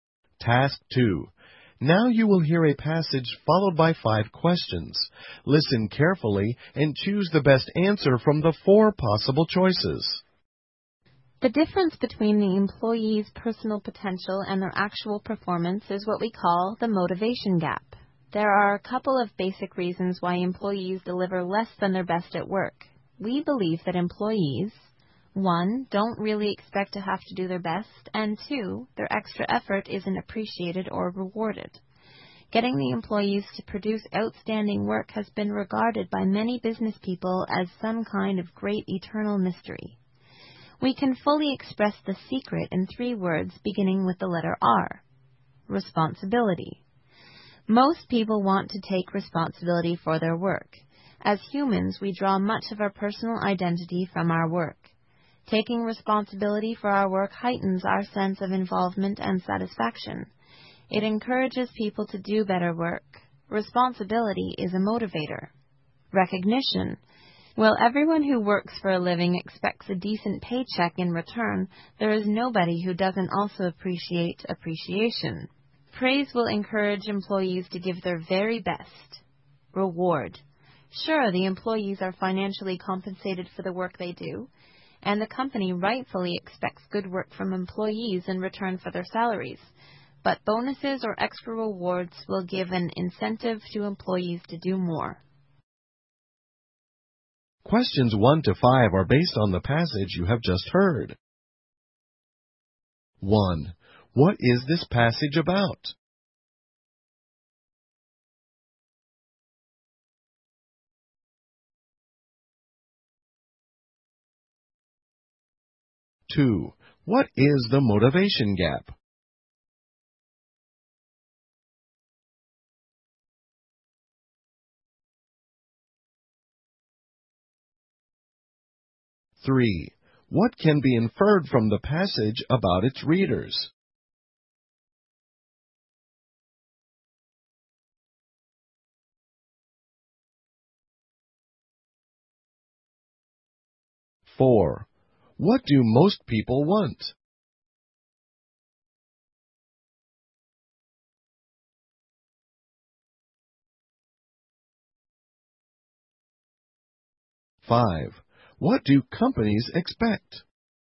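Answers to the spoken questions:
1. How to motivate employees to do their best
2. The difference between an employee's potential and actual performance
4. To take responsibility for their work
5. Good work from employees in return for their salaries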